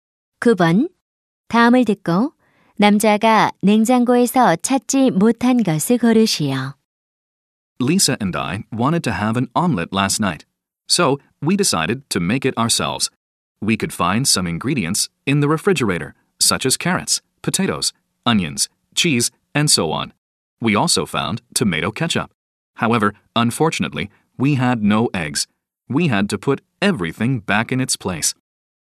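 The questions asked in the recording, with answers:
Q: 다음을 듣고 남자가 냉장고에서 찾지 못한 것을 고르시오.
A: 달걀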